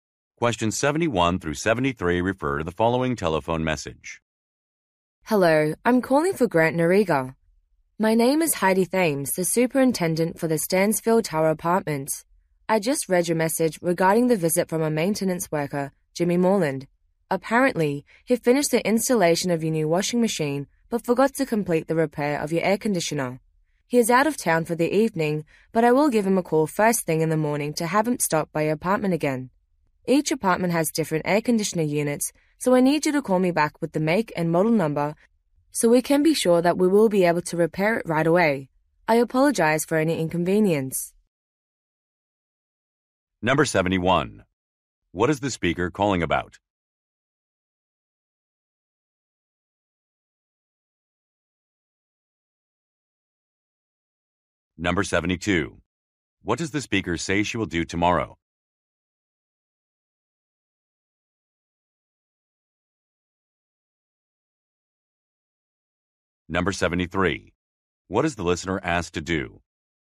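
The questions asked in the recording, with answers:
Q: What is the speaker calling about?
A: An unfinished air conditioner repair

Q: What does the speaker say she will do tomorrow?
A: Call the maintenance worker to have him come back

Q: What is the listener asked to do?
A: Call back with the air conditioner's make and model number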